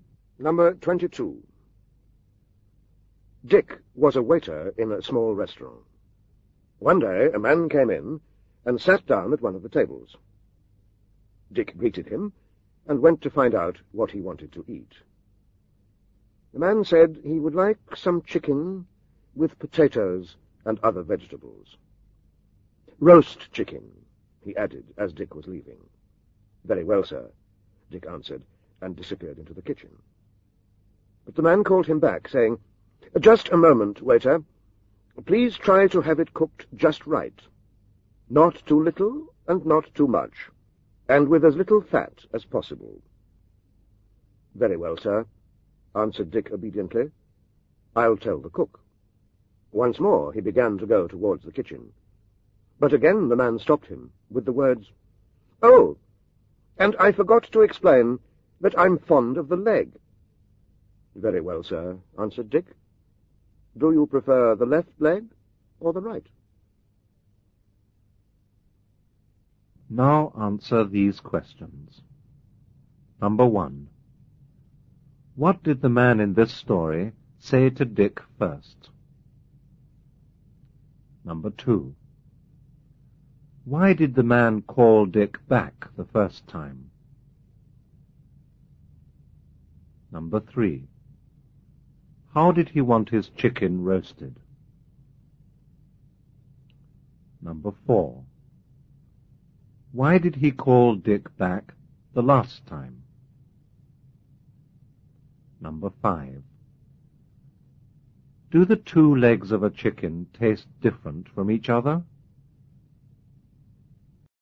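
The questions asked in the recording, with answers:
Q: What did the man in this story say to Dick first?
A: He would like some chicken with potatoes and other vegetables.

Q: Why did the man call Dick back the first time?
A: To ask him to have the chicken cooked just right.

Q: How did he want his chicken roasted?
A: Not too little and not too much, with as little fat as possible.

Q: Why did he call Dick back the last time?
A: To tell him he was fond of the leg.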